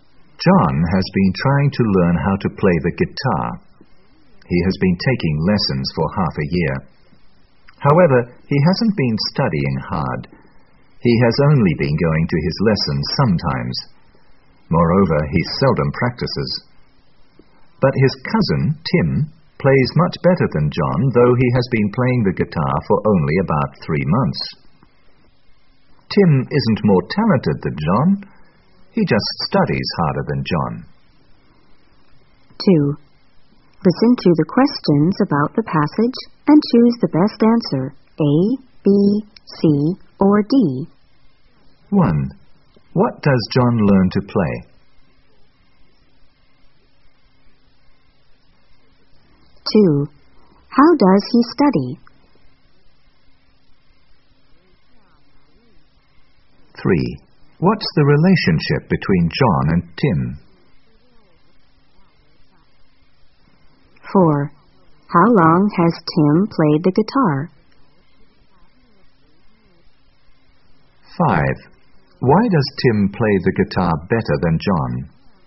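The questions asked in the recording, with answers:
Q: What does John learn to play?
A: The guitar

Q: How does he study?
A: He doesn't study hard; he seldom goes to lessons or practices

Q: What's the relationship between John and Tim?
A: They are cousins

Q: How long has Tim played the guitar?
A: About 3 months

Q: Why does Tim play the guitar better than John?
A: He studies harder than John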